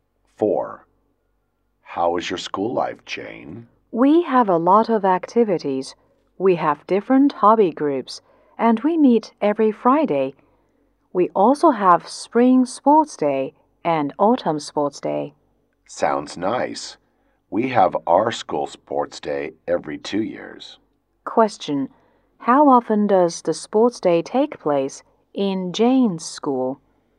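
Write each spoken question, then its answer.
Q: How often does the sports day take place in Jane's school?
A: Twice a year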